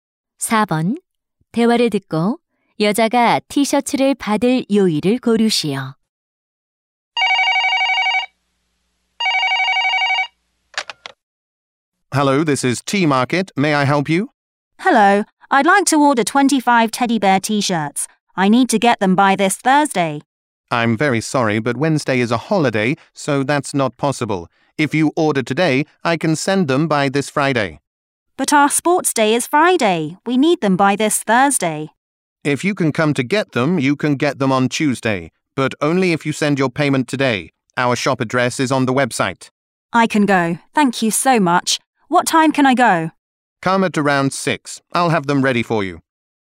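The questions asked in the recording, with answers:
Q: 대화를 듣고 여자가 티셔츠를 받을 요일을 고르시오.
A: 화요일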